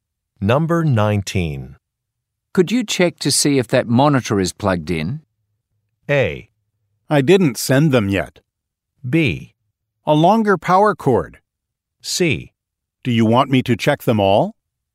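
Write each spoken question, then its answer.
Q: Could you check to see if that monitor is plugged in?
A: C: Do you want me to check them all?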